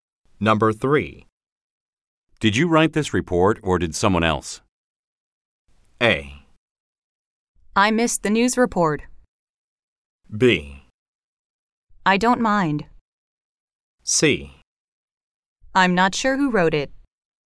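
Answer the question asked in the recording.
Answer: C: I'm not sure who wrote it.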